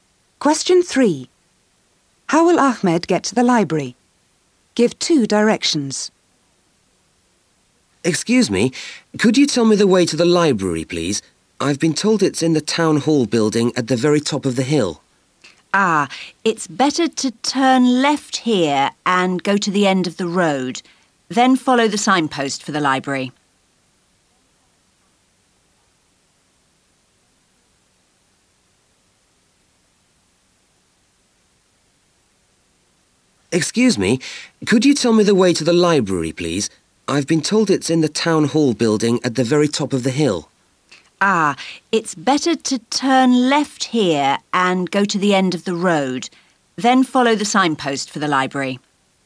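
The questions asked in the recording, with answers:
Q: How will Ahmed get to the library?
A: Turn left, go to the end of the road, then follow the signpost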